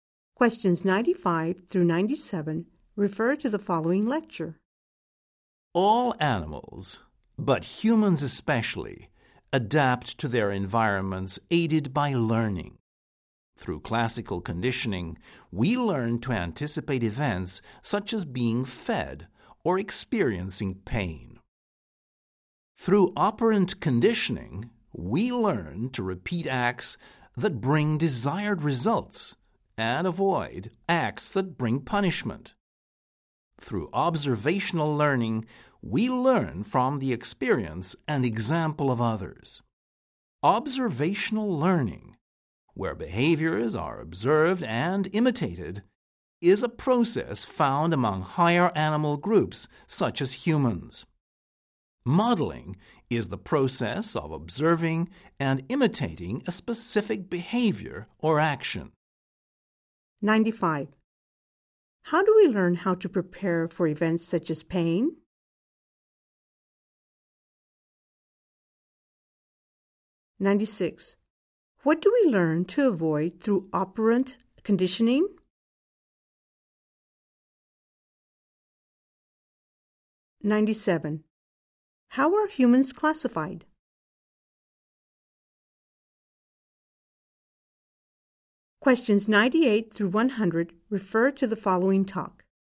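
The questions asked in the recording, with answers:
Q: How do we learn how to prepare for events such as pain?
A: Through classical conditioning

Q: What do we learn to avoid through operant conditioning?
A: Acts that bring punishment

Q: How are humans classified?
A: As a higher animal group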